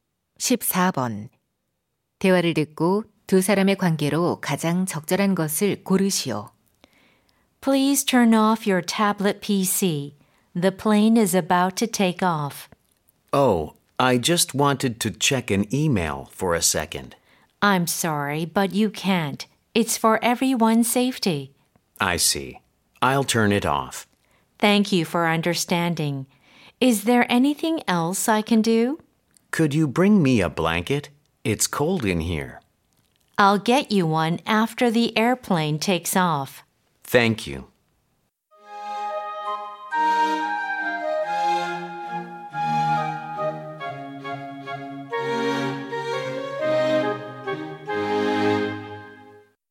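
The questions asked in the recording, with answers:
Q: 대화를 듣고 두 사람의 관계로 가장 적절한 것을 고르시오.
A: 승무원 - 승객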